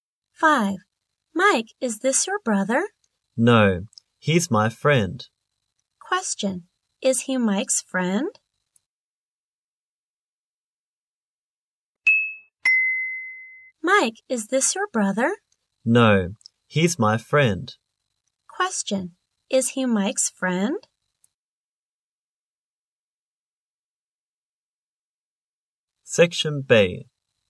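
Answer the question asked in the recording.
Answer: Yes, he is.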